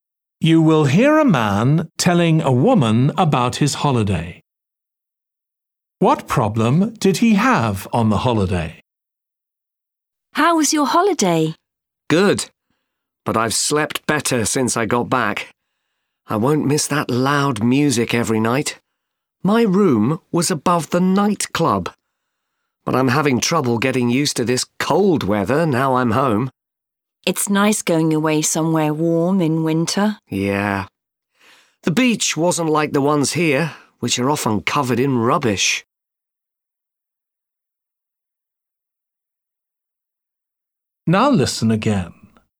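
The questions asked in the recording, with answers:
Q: What problem did he have on the holiday?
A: Loud music kept him awake at night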